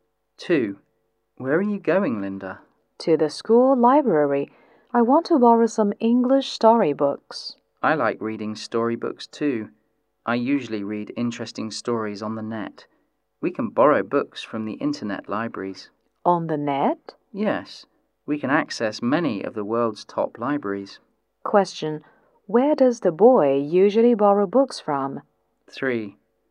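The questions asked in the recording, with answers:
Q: Where does the boy usually borrow books from?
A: From internet libraries (on the net)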